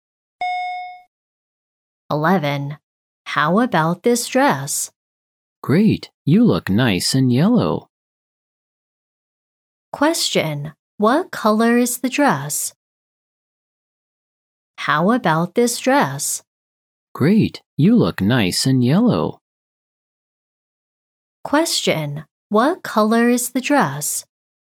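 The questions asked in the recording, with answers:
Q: Question, what color is the dress?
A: Yellow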